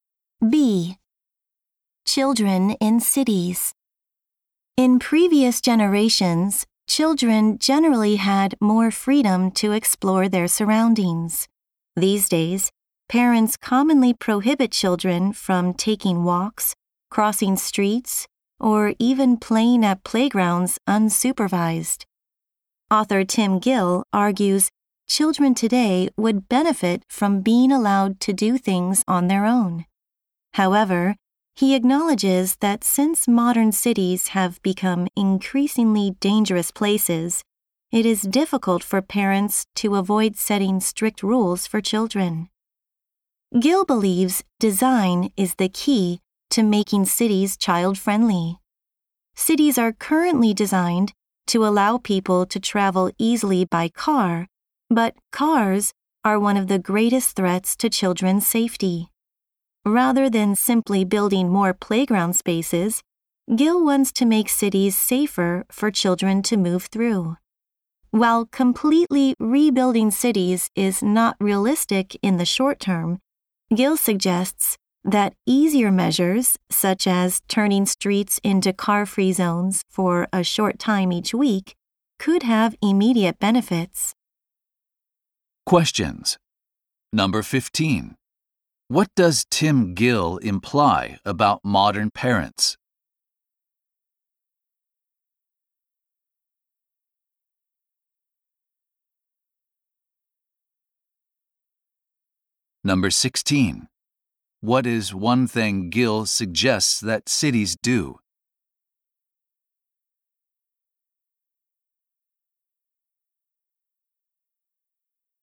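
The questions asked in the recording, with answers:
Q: What does Tim Gill imply about modern parents?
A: It is hard for them to avoid strict rules because cities have become dangerous.

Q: What is one thing Gill suggests that cities do?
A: Make streets car-free zones for a short time each week.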